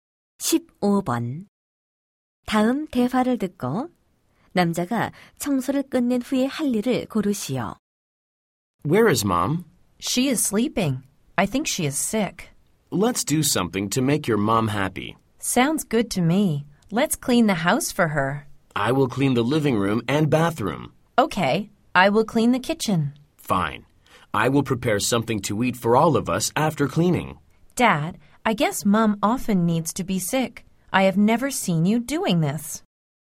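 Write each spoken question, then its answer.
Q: 다음 대화를 듣고 남자가 청소를 끝낸 후에 할 일을 고르시오.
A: 먹을 것 준비하기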